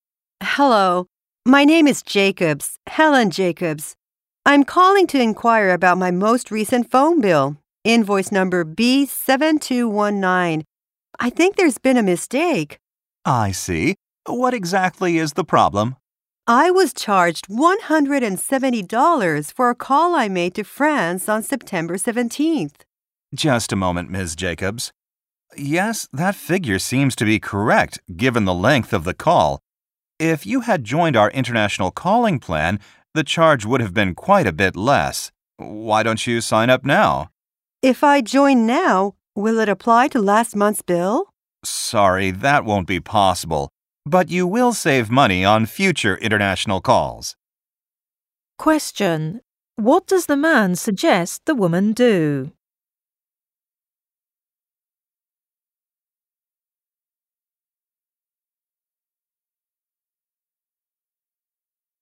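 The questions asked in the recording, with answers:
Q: Question: What does the man suggest the woman do?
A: Sign up for the international calling plan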